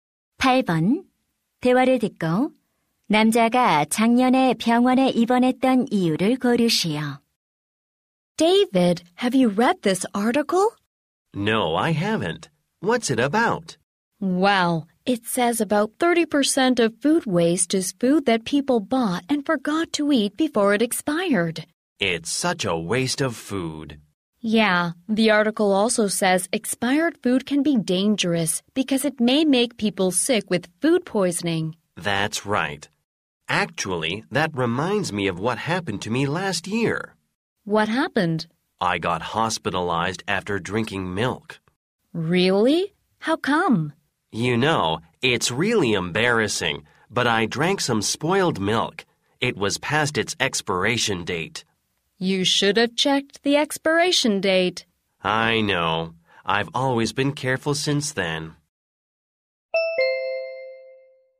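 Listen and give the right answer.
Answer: 유통기한이 지난 상한 우유를 마셔서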